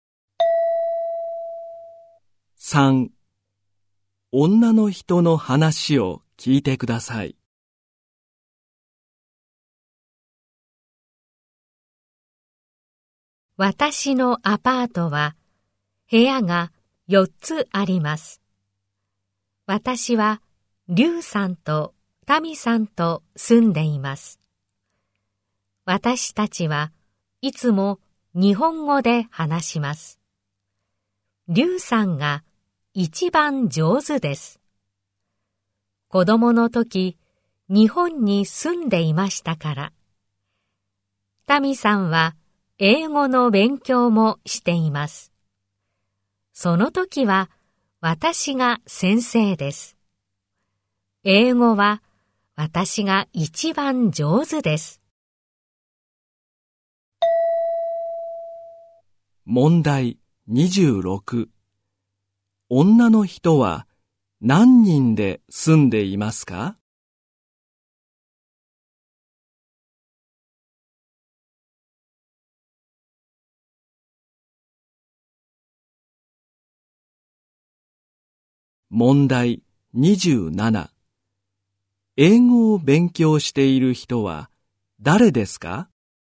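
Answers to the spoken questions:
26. 3人
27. タミさん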